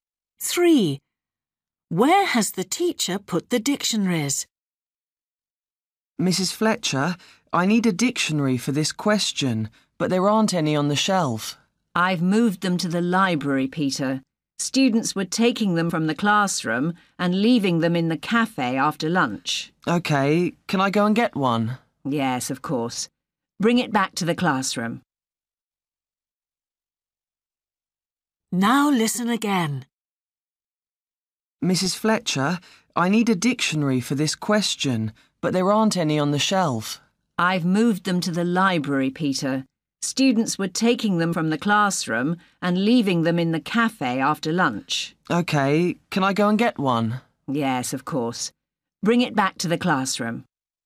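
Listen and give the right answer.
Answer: in the library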